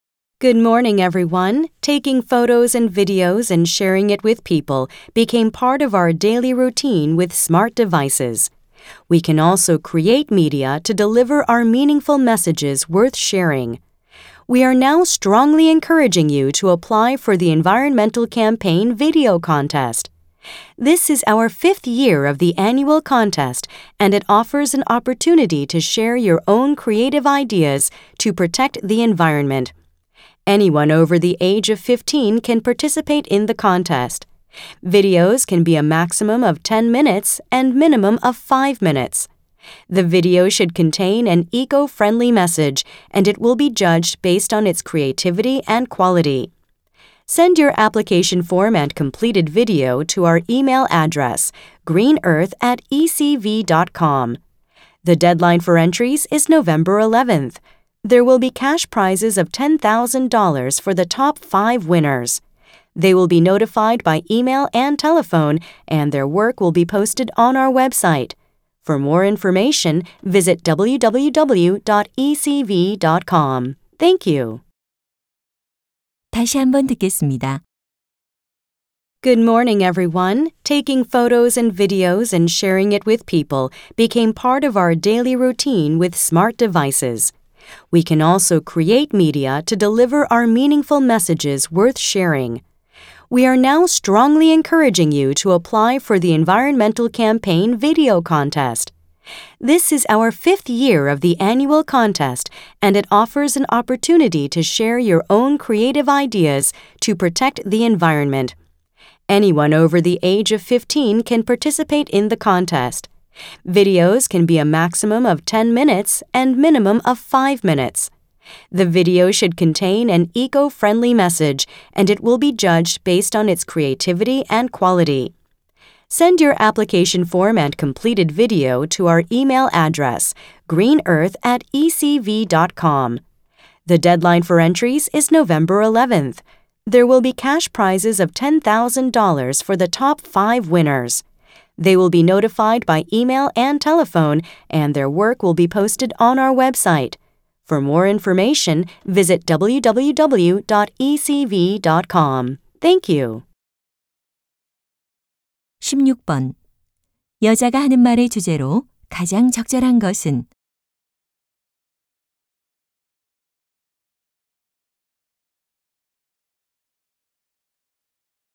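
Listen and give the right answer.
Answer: 환경 캠페인 영상 공모전 참가 독려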